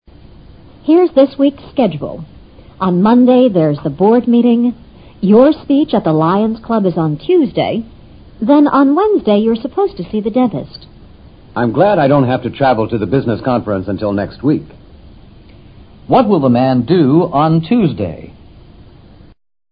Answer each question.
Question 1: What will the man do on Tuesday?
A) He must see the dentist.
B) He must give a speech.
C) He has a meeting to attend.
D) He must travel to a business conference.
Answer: B

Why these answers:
答案只是对话所包含的全部信息中的一部分。记忆似乎比理解更重要一些。board meeting: 理事会议。Lion's Club: 会员多为社会名流的非学术性组织。 dentist: 牙科医生。

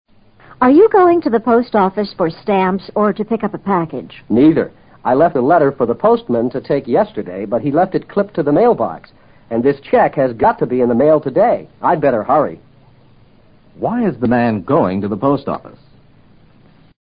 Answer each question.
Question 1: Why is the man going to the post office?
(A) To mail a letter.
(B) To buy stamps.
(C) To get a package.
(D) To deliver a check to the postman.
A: A

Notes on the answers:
他的讲话说得很清楚,既不是去买邮票,也不是取包果。他说昨天放在信箱里的一封信邮递员未取走,而信中的支票必须今天寄出,所以他得赶到邮局去寄掉。package: 包果。left it clipped to the mail box指该信因紧贴在信箱上被邮递员忽略未取。这里的mailbox指各家各户自己的信箱。邮递员挨户投递信件的同时,也取走各户外寄的信件。

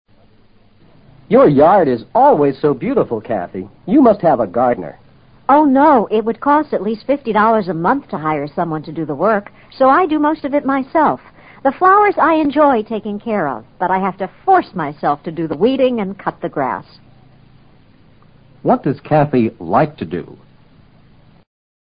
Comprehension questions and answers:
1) What does Cathy like to do?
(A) Mow the lawn.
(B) Weed the flowers.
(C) Pay $50 a month for a gardener.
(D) Work in the flowerbeds.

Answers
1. D

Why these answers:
答案是依据The flowers I enjoy taking care of (倒装句)一句话所提供的信息做出推断。mow the lawn 即cut the grass 是她不乐意干的事(I have to force myself to...)。week the flowers 意思是除掉花。与taking care of flowers是截然相反的两回事。C与I do most of it myself的意思相悖。weeding: 除草。

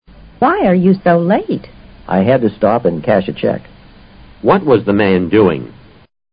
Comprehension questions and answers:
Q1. What was the man doing?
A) Checking on something.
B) Stopping at a traffic light.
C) Getting some money.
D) Buying a plate.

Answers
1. C

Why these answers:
cash a cheek: 把支票兑换成现款。这个意思与答案是一致的。

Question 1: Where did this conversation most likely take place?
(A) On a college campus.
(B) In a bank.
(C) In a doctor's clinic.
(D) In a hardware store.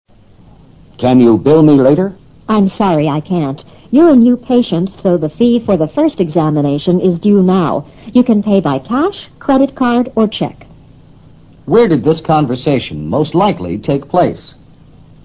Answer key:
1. C

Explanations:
patient (病人)是个关键词,根据这个词提供的信息就可以做出选择。bill 是发帐单通知 当事人付款。due now: 现在就应支付。cash: 现款。credit card: 信用卡。check: 支票。这是三种主要付款方式。hardware store: 五金商店。

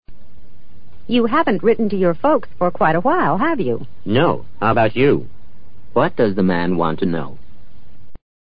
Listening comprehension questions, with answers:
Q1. What does the man want to know?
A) If she is in good health.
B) If she has corresponded with her relatives recently.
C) If she is about to write to her folks.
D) If she still receives a lot of letters.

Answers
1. B

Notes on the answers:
How about you 多用于向问话人提出同样的问题,所以他实际上是问她是否给亲人写了信。B与这个意思是一致的,只是用词不尽相同。folks指双亲或亲友,与relatives同义。correspond: 通讯。A与题无关。C时态与对话不一致。D与原句义不符(write 与receive不是同一概念)。

